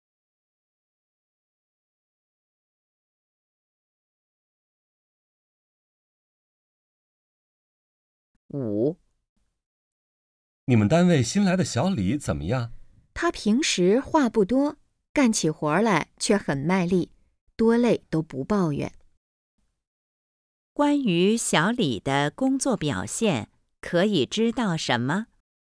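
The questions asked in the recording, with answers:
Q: 关于小李的工作表现,可以知道什么?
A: 干活很卖力,不抱怨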